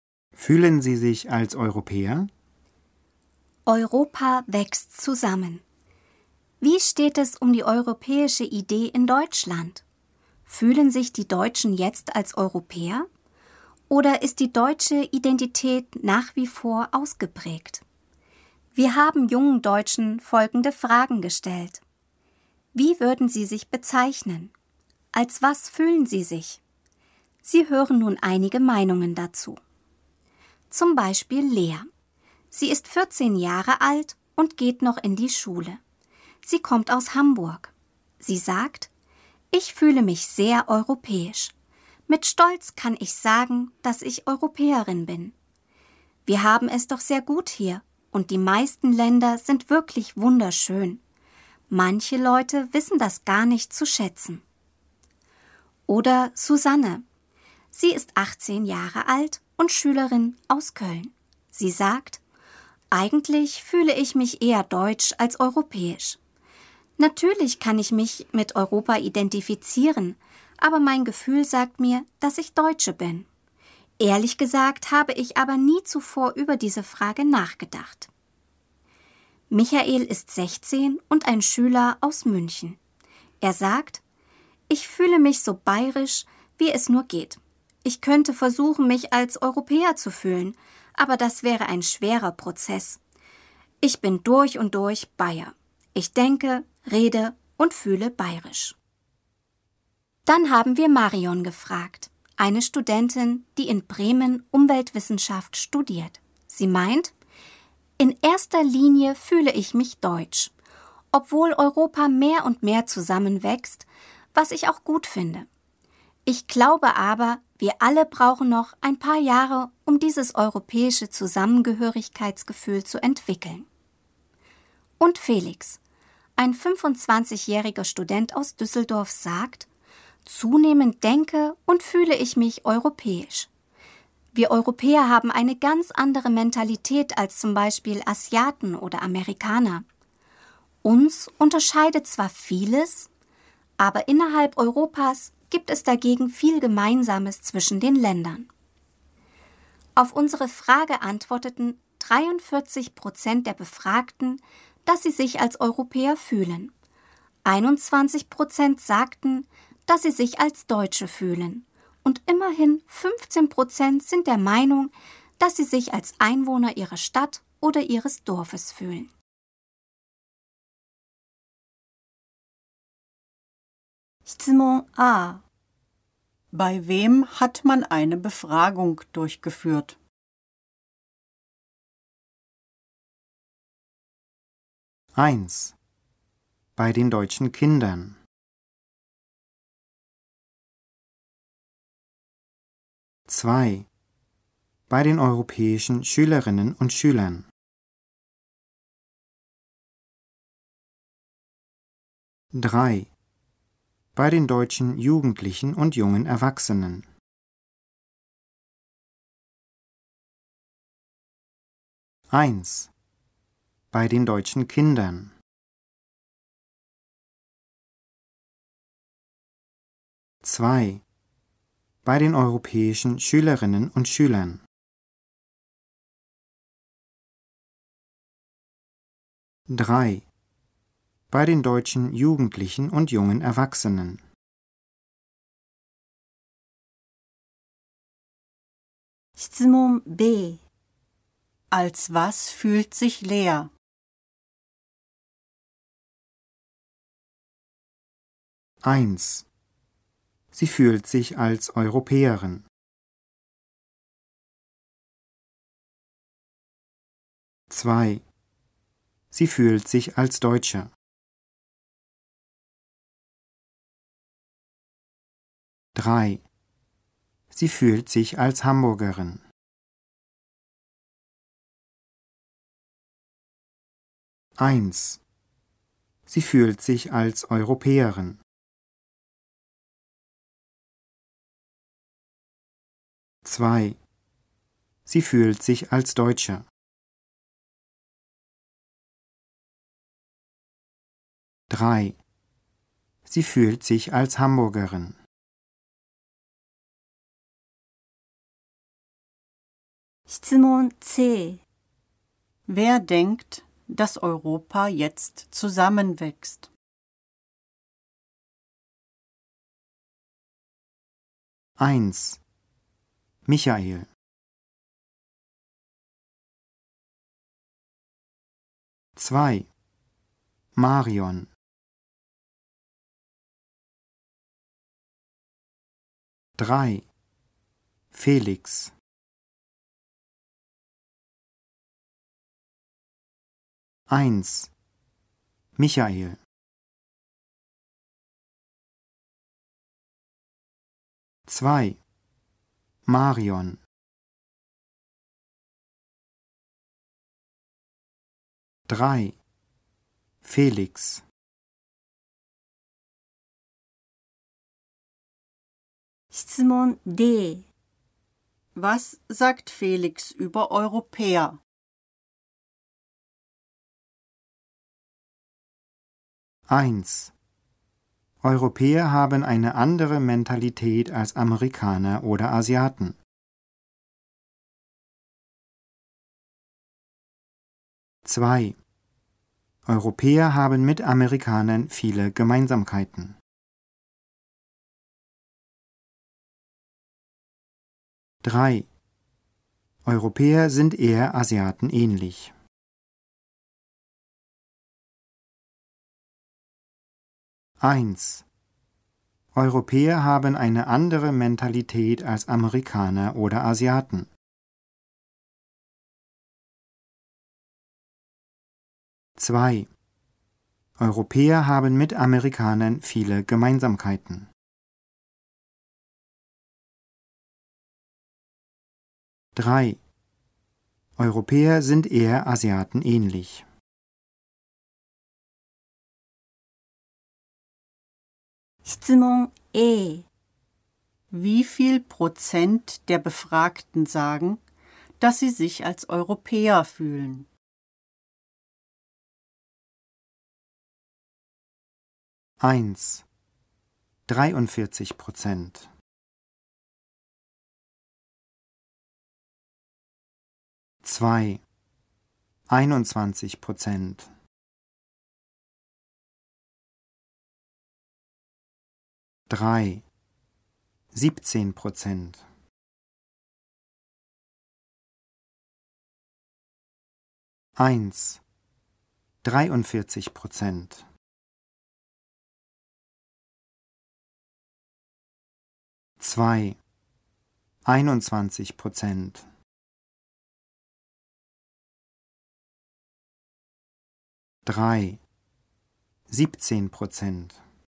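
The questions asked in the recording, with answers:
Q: Bei wem hat man eine Befragung durchgeführt?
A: 3: Bei den deutschen Jugendlichen und jungen Erwachsenen.

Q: Als was fühlt sich Lea?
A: 1: Sie fühlt sich als Europäerin.

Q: Wer denkt, dass Europa jetzt zusammenwächst?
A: 2: Marion.

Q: Was sagt Felix über Europäer?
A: 1: Europäer haben eine andere Mentalität als Amerikaner oder Asiaten.

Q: Wie viel Prozent der Befragten sagen, dass sie sich als Europäer fühlen?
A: 1: 43%.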